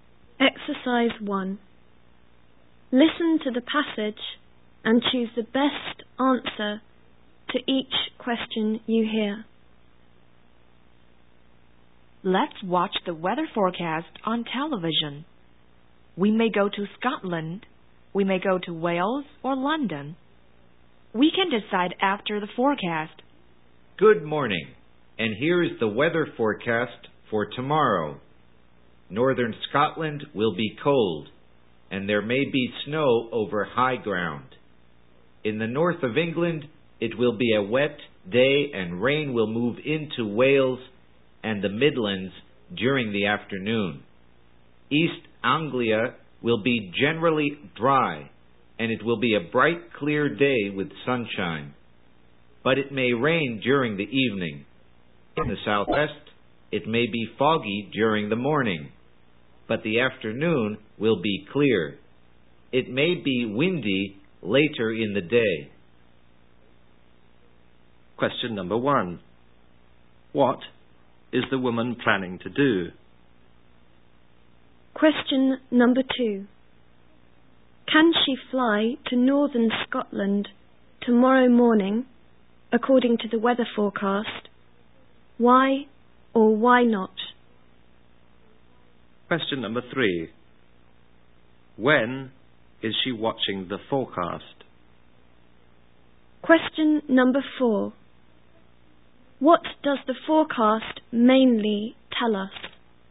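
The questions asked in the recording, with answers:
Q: What does the forecast mainly tell us?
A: Tomorrow's weather in different parts of Britain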